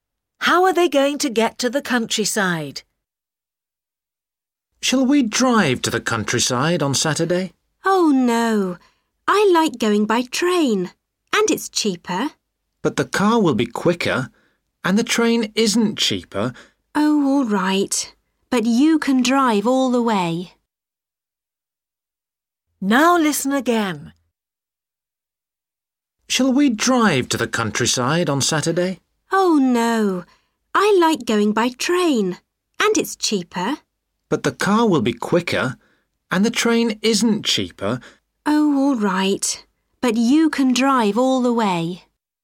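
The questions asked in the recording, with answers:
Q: How are they going to get to the countryside?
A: By car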